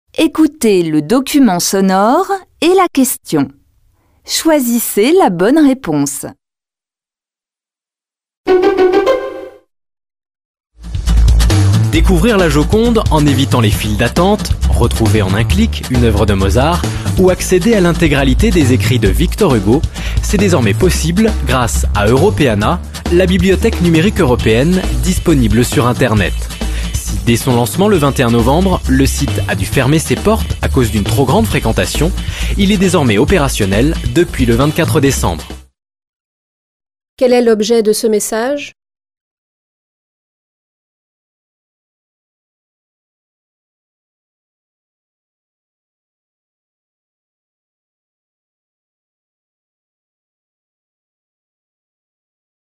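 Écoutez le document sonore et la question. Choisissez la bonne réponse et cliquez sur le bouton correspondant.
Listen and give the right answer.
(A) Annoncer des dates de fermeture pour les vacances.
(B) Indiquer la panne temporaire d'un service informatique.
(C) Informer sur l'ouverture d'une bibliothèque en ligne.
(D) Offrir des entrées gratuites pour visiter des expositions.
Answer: (C) Informer sur l'ouverture d'une bibliothèque en ligne.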